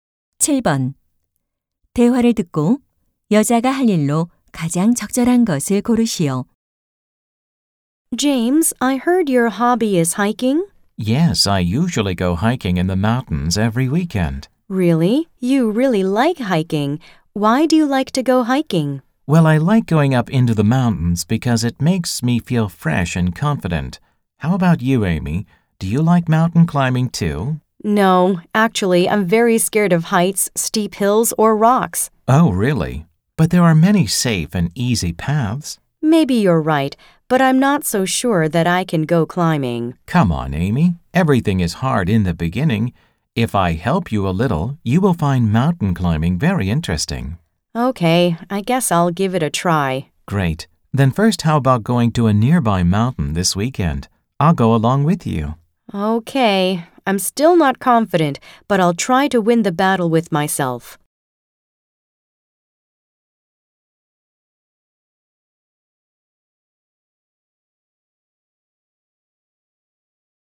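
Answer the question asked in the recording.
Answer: 이번 주말에 근처 산으로 등산 가기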